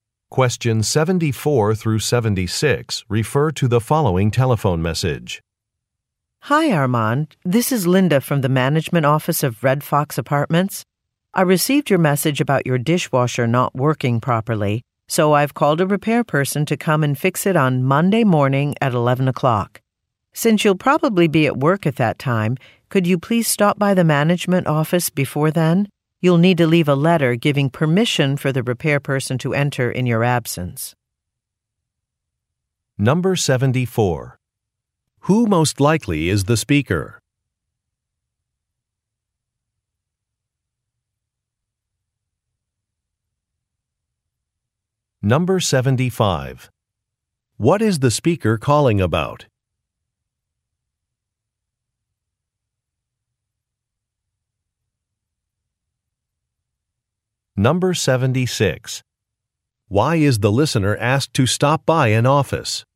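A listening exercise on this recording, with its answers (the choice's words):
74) Who most likely is the speaker?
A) An appliance salesperson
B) A repair technician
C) An apartment manager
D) A hotel receptionist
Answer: An apartment manager

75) What is the speaker calling about?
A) An advertised rebate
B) An expired warranty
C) An inaccessible parking space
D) A broken appliance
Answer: A broken appliance

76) Why is the listener asked to stop by an office?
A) To return a package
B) To collect a package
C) To drop off a letter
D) To make a payment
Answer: To drop off a letter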